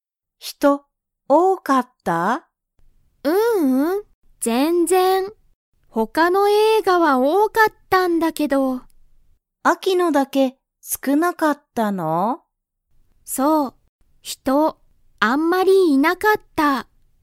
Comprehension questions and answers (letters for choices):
Comprehension Quiz (Skip if you don't understand the conversation yet)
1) アキの映画えいがは、人(ひと)が多(おお)かったですか?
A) はい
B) いいえ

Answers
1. B